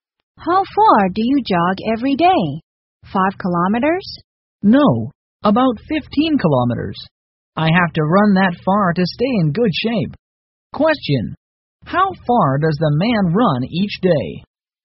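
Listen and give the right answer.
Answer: About 15 kilometers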